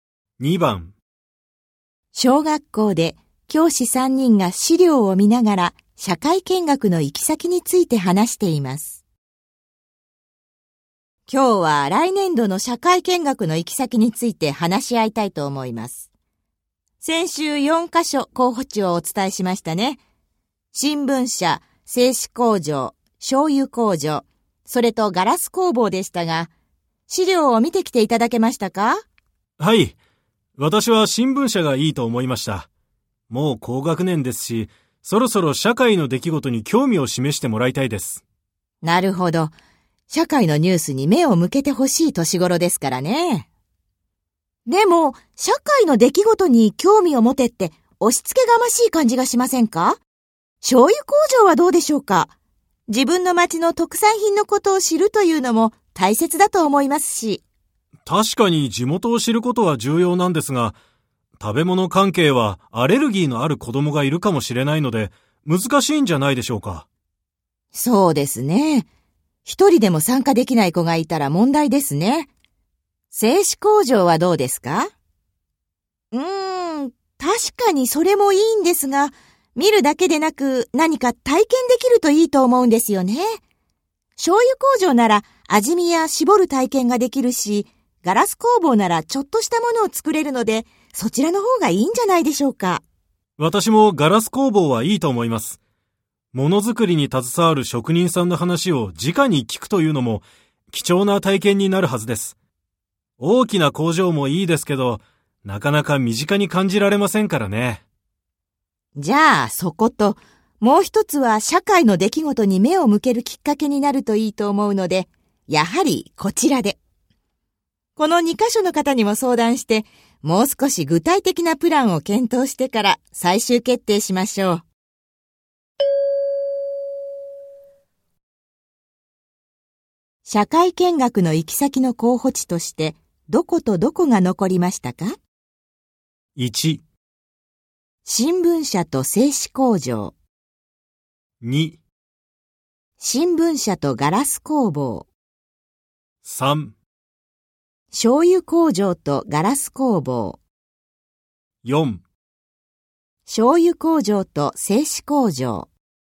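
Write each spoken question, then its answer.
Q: 社会見学の行き先の候補地としてどことどこが残りましたか?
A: 2: 新聞社とガラス工房。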